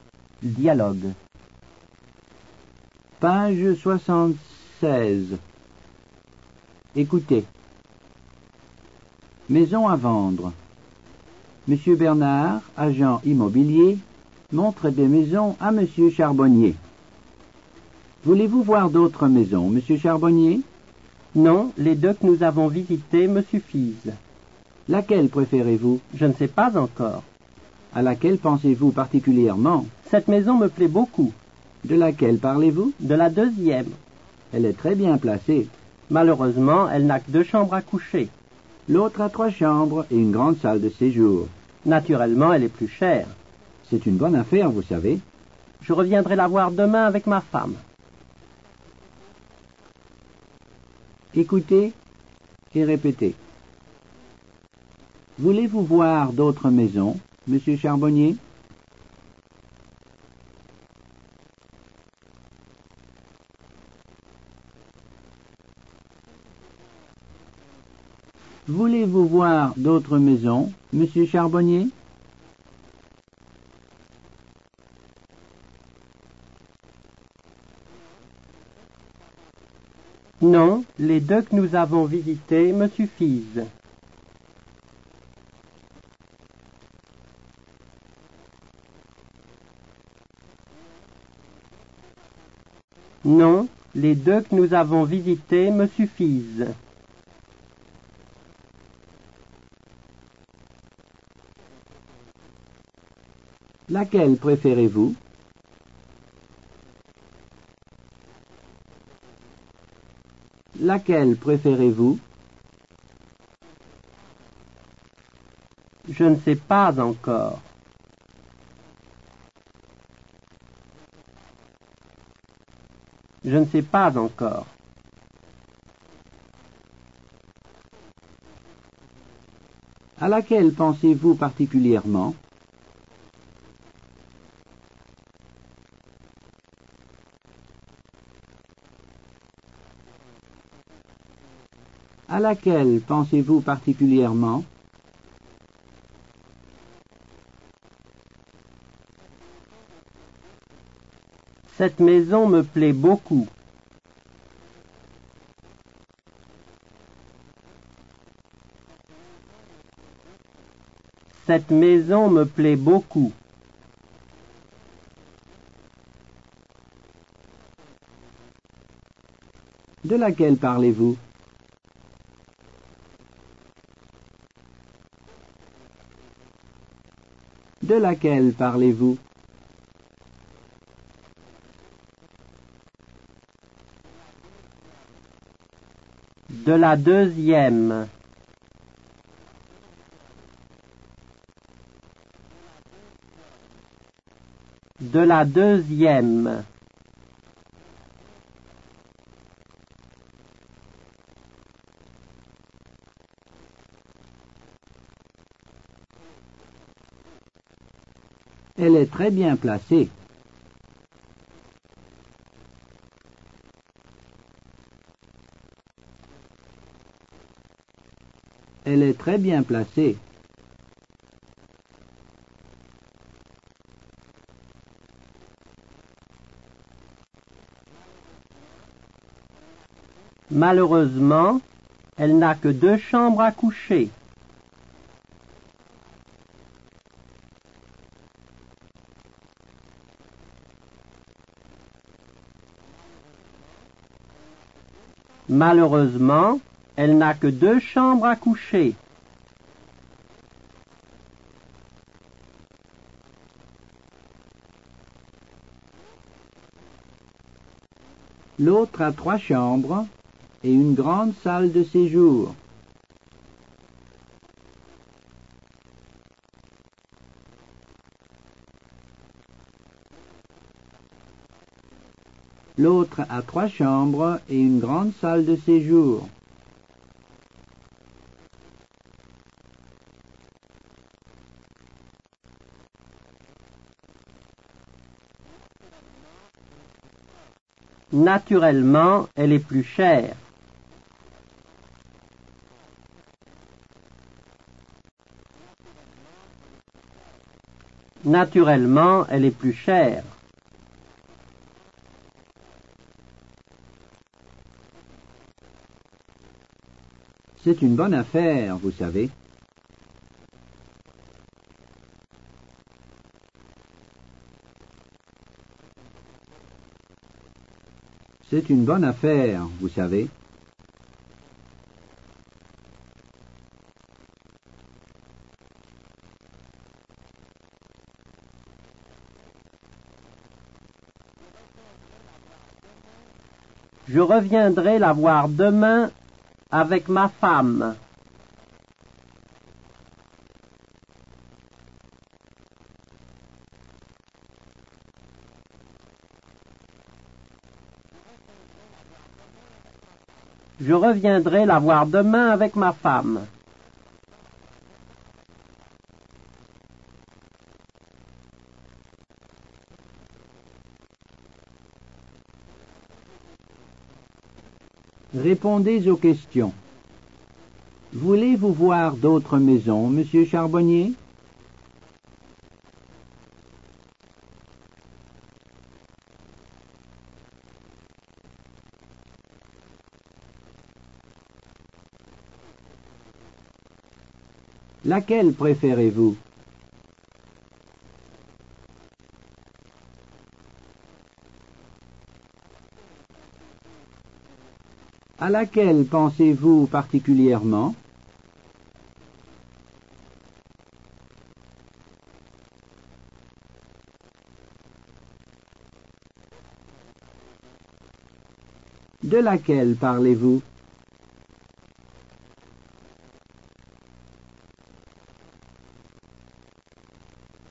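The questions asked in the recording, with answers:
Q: Voulez-vous voir d'autres maisons, Monsieur Charbonnier?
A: Non, les deux que nous avons visitées me suffisent.

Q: Laquelle préférez-vous?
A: Je ne sais pas encore.

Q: À laquelle pensez-vous particulièrement?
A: Cette maison me plaît beaucoup.

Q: De laquelle parlez-vous?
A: De la deuxième.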